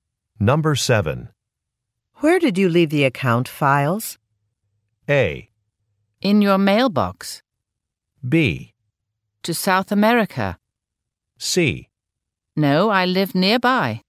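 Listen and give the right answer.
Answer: A: In your mailbox.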